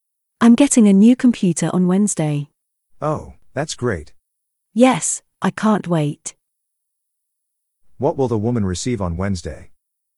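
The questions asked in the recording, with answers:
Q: What will the woman receive on Wednesday?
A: A new computer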